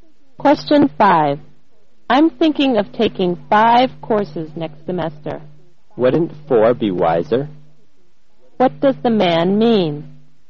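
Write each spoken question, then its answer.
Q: What does the man mean?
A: Taking four courses would be wiser than five.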